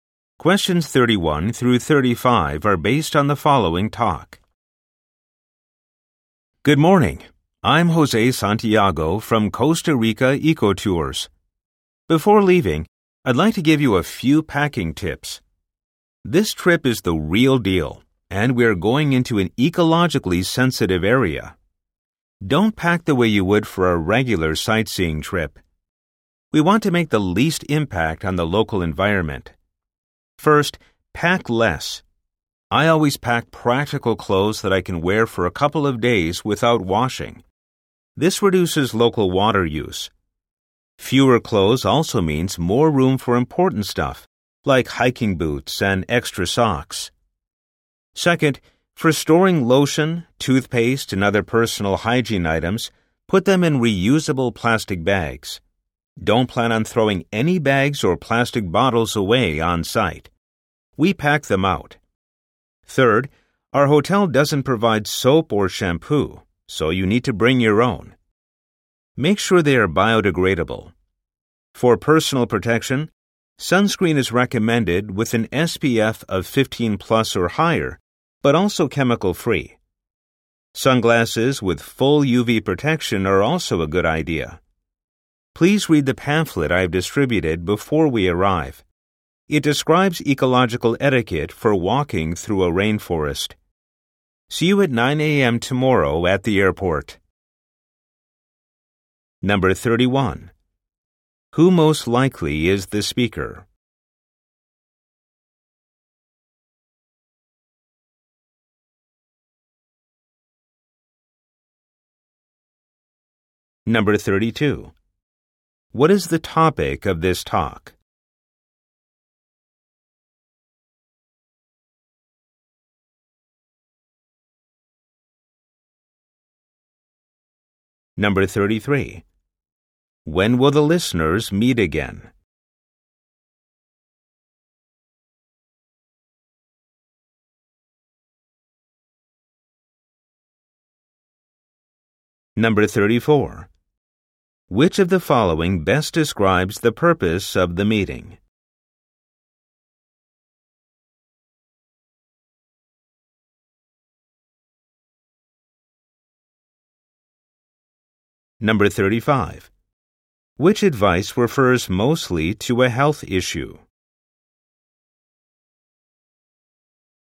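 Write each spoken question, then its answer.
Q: Who most likely is the speaker?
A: A tour guide for an eco-tour company

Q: What is the topic of this talk?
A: Packing tips for an eco-tour

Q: When will the listeners meet again?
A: At 9 a.m. tomorrow at the airport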